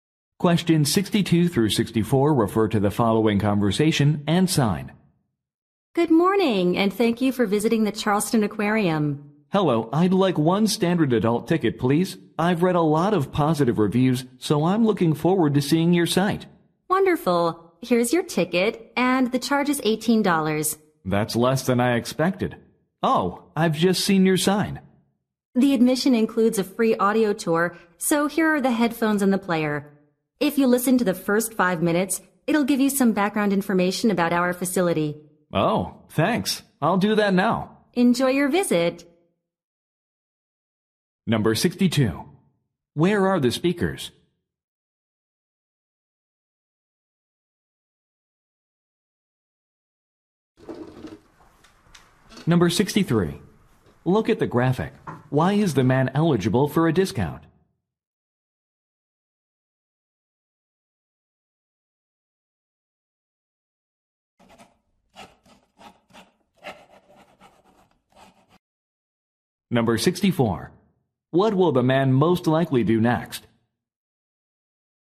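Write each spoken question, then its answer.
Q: Where are the speakers?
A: At an aquarium

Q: What will the man most likely do next?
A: Listen to the audio tour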